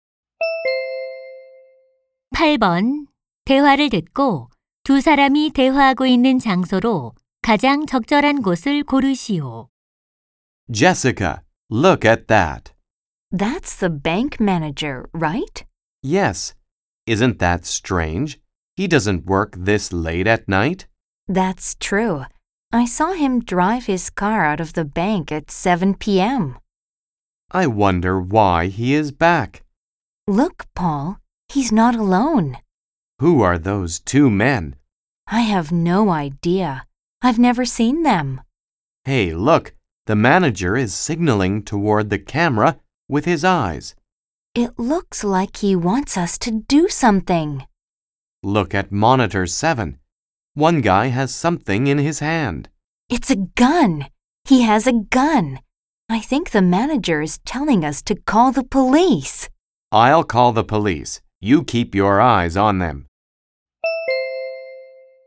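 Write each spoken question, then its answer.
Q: 대화를 듣고 두 사람이 대화하고 있는 장소로 가장 적절한 곳을 고르시오.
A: 은행 경비실(CCTV 모니터실)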